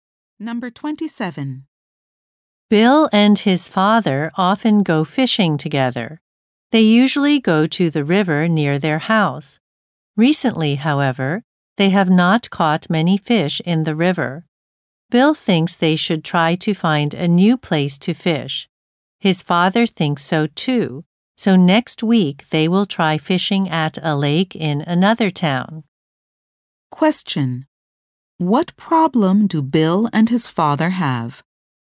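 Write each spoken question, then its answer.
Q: What problem do Bill and his father have?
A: They haven't caught many fish in the river recently.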